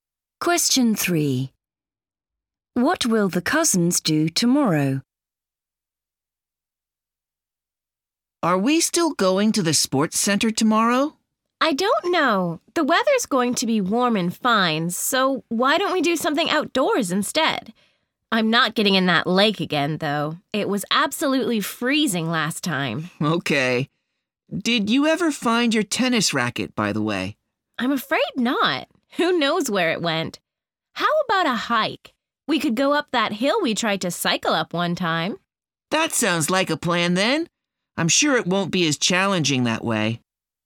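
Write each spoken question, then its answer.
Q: What will the cousins do tomorrow?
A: Go on a hike up a hill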